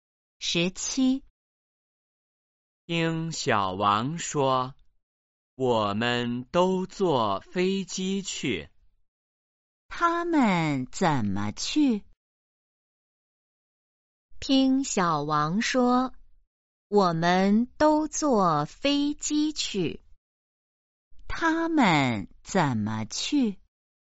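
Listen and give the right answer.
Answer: 坐飞机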